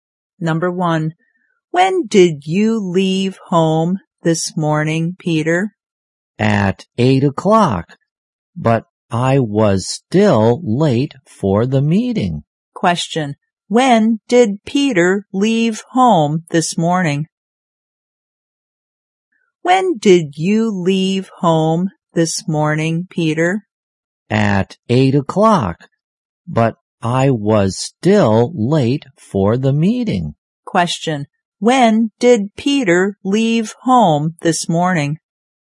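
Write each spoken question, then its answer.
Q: when did Peter leave home this morning?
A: At 8 o'clock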